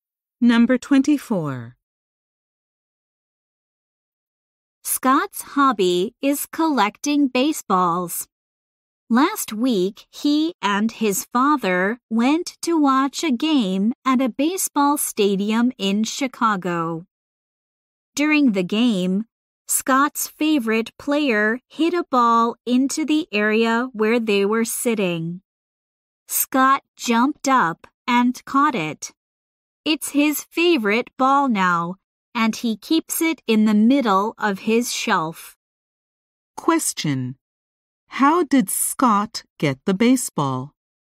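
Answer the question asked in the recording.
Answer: He caught a ball his favorite player hit at the game.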